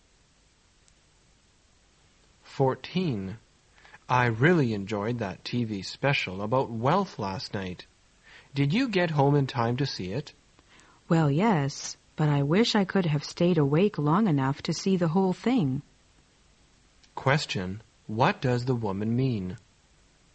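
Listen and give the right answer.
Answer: She fell asleep before the program ended.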